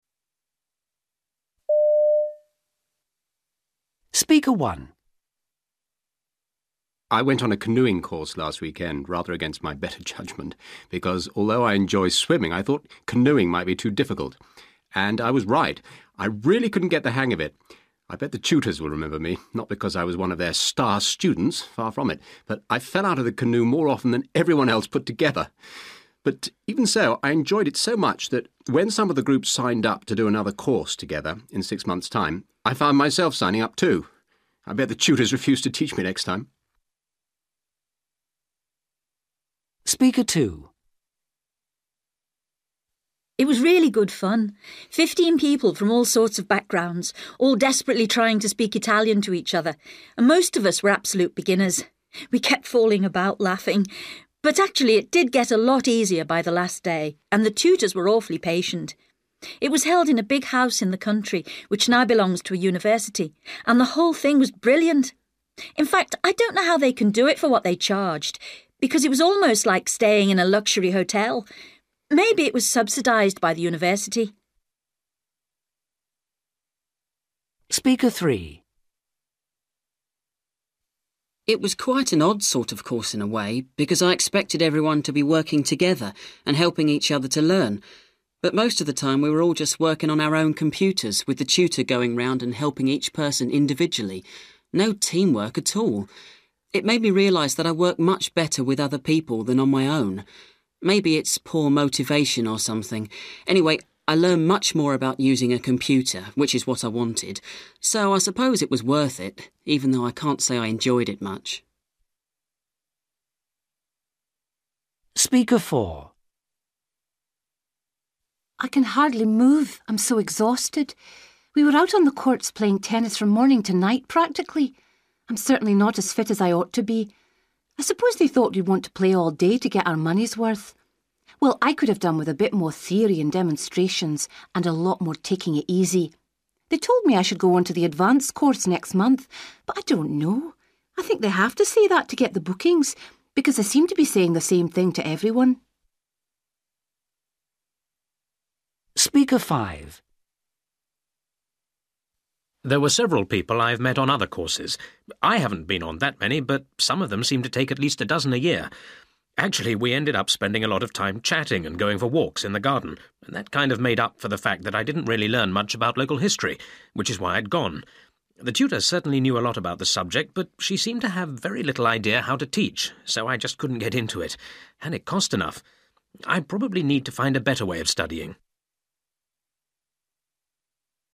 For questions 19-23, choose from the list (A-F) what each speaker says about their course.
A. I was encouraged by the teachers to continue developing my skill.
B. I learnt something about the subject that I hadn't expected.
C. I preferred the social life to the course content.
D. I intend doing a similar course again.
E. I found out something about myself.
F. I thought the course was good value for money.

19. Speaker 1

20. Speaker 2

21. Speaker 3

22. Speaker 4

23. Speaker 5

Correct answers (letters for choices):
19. D
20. F
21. E
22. A
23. C

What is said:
Man: I went on a canoeing course last weekend, rather against my better judgement, because although I enjoy swimming, I thought canoeing might be too difficult. And I was right. I really couldn't get the hang of it. I bet the tutors will remember me: not because I was one of their star students, far from it, but I fell out of the canoe more often than everyone else put together! But even so, I enjoyed it so much that when some of the group signed up to do another course together, in six months' time, I found myself signing up too. I bet the tutors refuse to teach me next time!
Woman: It was really good fun: 15 people from all sorts of backgrounds, all desperately trying to speak Italian to each other, and most of us were absolute beginners. We kept falling about laughing, but actually it did get a lot easier by the last day, and the tutors were awfully patient. It was held in a big house in the country which now belongs to a university, and the whole thing was brilliant. In fact I don't know how they can do it for what they charged, because it was almost like staying in a luxury hotel. Maybe it was subsidised by the university.
Man: It was quite an odd sort of course, in a way, because I expected everyone to be working together, and helping each other to learn, but most of the time we were all just working on our own computers, with the tutor going round and helping each person individually. No teamwork at all. It made me realise that I work much better with other people than on my own: maybe it's poor motivation, or something. Anyway, I learned much more about using a computer, which is what I wanted, so I suppose it was worth it, even though I can't say I enjoyed it much.
Woman: I can hardly move, I'm so exhausted. We were out on the courts playing tennis from morning to night, practically. I'm certainly not as fit as I ought to be. I suppose they thought we'd want to play all day to get our money's worth. Well, I could have done with a bit more theory and demonstrations, and a lot more taking it easy! They told me I should go on to the advanced course, next month, but I don't know; I think they have to say that to get the bookings, because the seemed to be saying the name thing to everyone.
Man: There were several people I've met on other courses: I haven't been on that many, but some of them seemed to take at least a dozen a year. Actually we ended up spending a lot of time chatting and going for walks in the garden, and that kind of made up for the fact that I didn't really learn much about local history, which is why I'd gone. The tutor certainly knew a lot about the subject, but she seemed to have very little idea how to teach, so I just couldn't get into it. And it cost enough. I probably need to find a better way of studying.

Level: B2